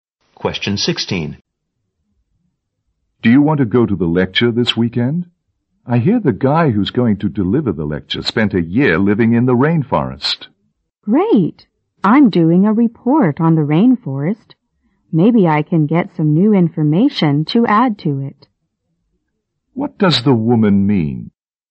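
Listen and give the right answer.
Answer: She will go to the lecture to get new information for her rainforest report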